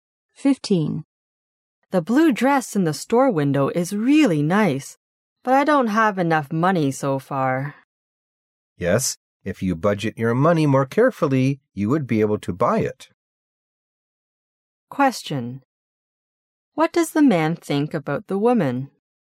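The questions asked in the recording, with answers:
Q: What does the man think about the woman?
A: She should budget her money more carefully.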